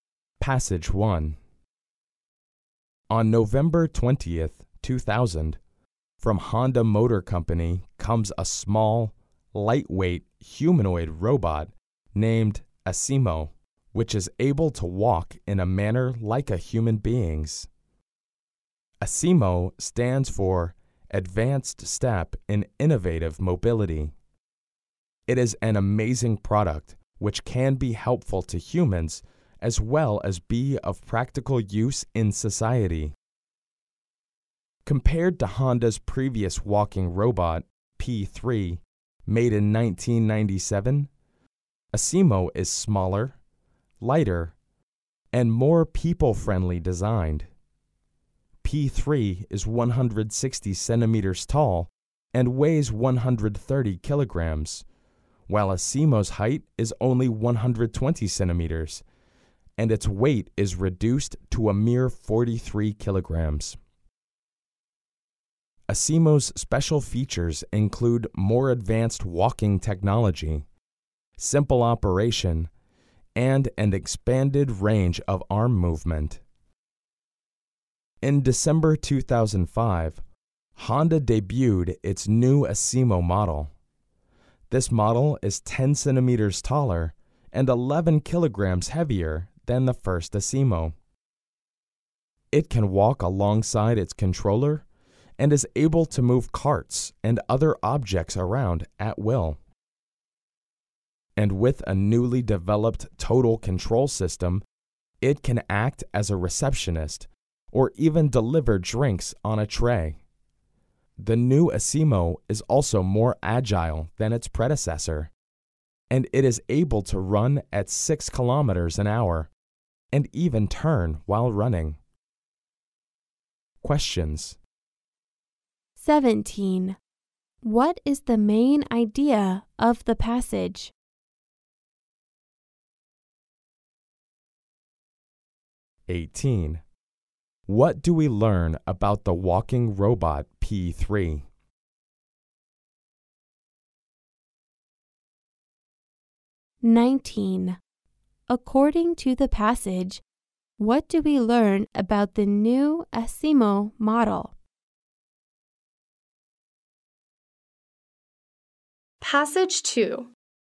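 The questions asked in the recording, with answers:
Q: What do we learn about the walking robot P3?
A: It was made in 1997; it is 160 cm tall and weighs 130 kg, so it is bigger and heavier than Asimo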